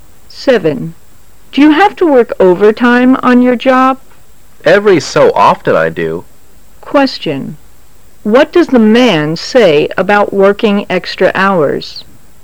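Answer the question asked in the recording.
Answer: He works overtime occasionally.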